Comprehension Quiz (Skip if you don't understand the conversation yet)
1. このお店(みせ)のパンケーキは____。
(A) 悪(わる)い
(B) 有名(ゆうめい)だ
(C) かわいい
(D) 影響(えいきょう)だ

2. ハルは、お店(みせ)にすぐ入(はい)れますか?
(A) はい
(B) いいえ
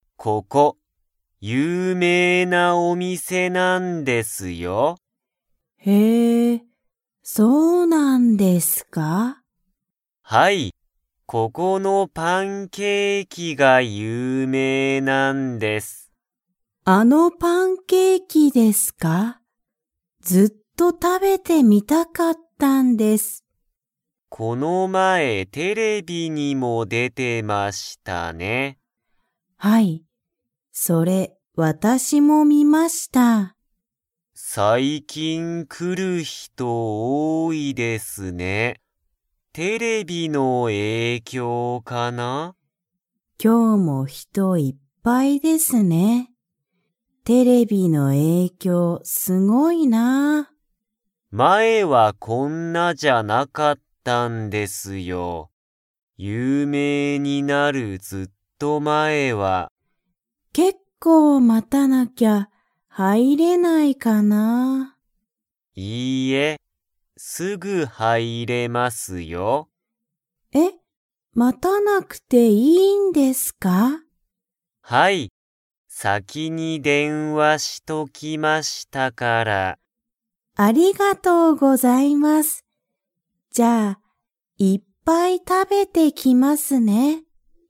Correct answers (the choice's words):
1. 有名(ゆうめい)だ
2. はい

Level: Level 2